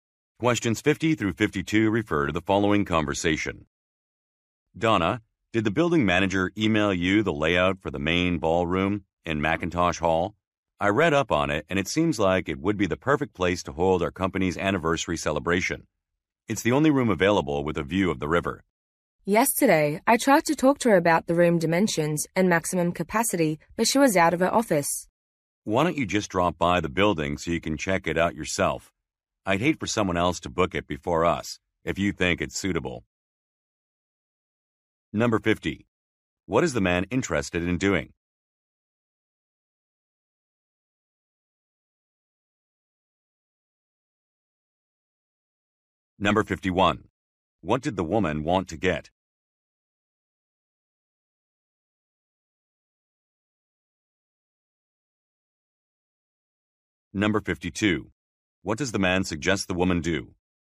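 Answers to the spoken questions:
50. Booking the ballroom for the company anniversary celebration
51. The room dimensions and maximum capacity
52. Visit the building herself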